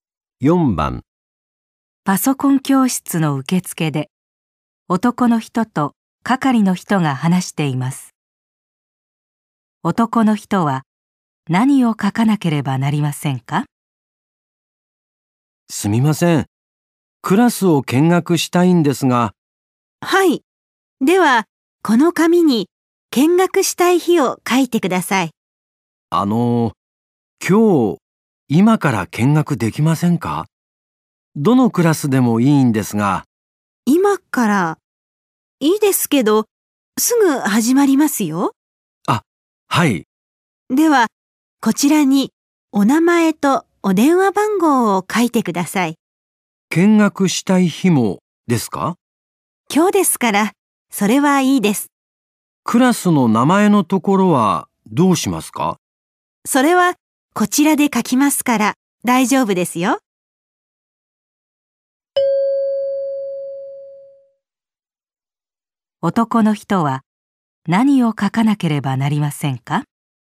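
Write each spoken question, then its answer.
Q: 男の人は何を書かなければなりませんか?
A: 名前と電話番号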